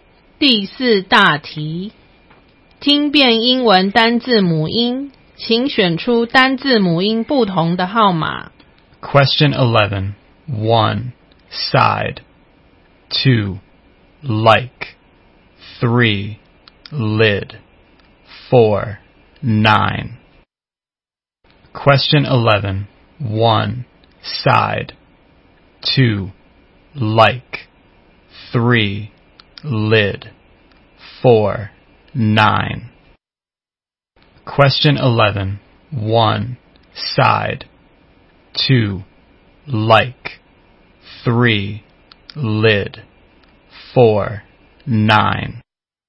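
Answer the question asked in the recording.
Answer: 3: lid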